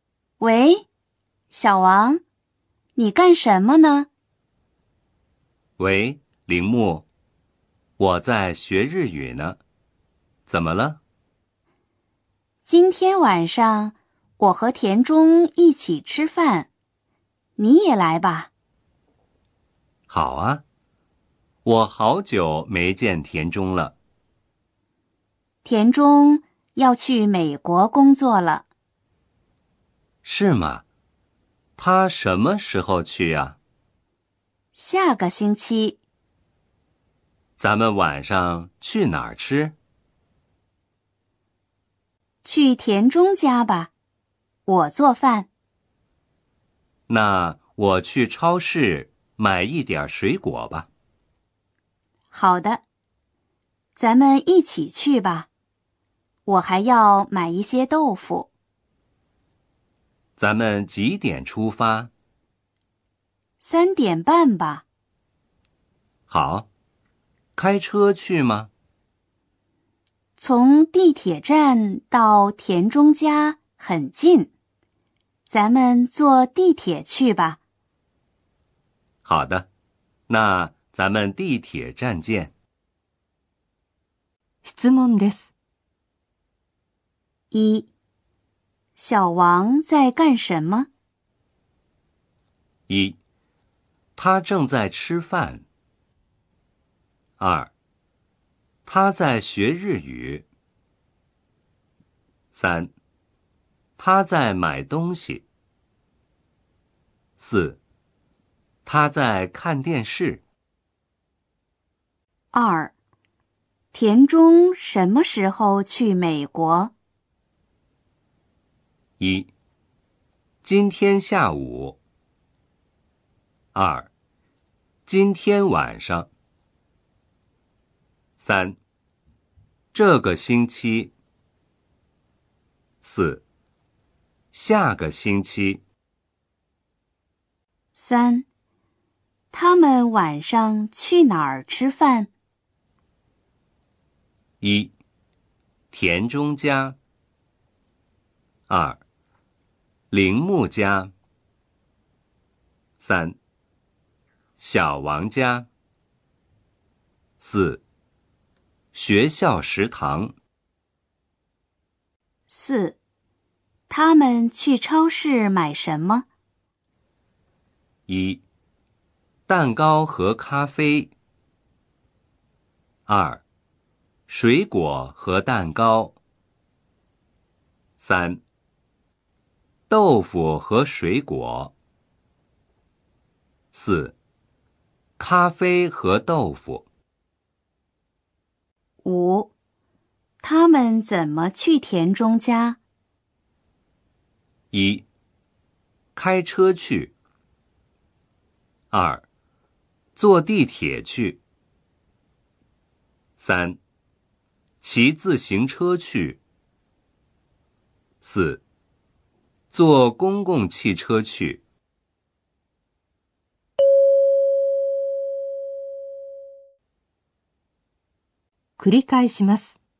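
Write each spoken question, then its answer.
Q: 小王在干什么?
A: 2: 他在学日语。

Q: 田中什么时候去美国?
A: 4: 下个星期。

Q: 他们晚上去哪儿吃饭?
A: 1: 田中家。

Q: 他们去超市买什么?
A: 3: 豆腐和水果。

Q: 他们怎么去田中家?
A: 2: 坐地铁去。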